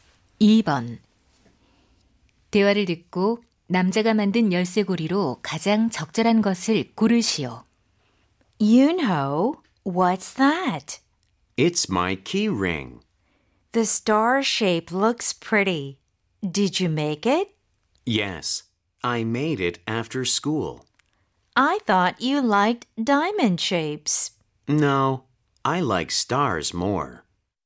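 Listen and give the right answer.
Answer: 별 모양 열쇠고리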